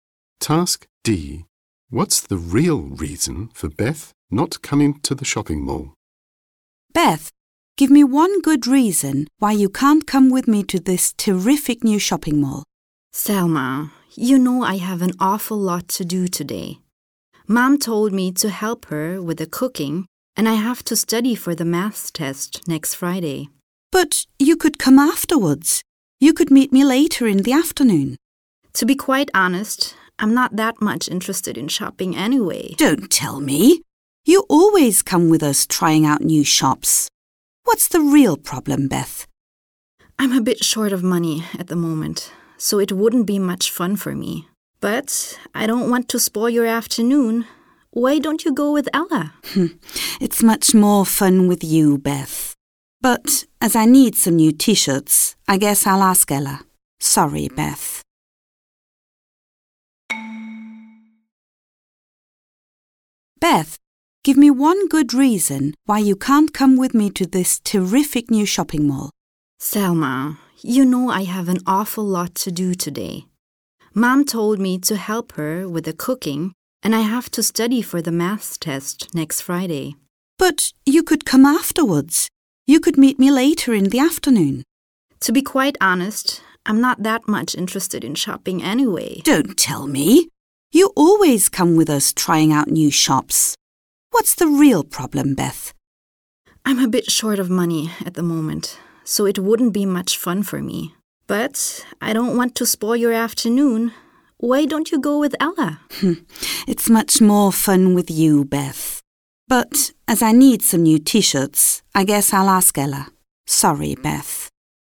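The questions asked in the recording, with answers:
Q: What's the real reason for Beth not coming to the shopping mall?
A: She is short of money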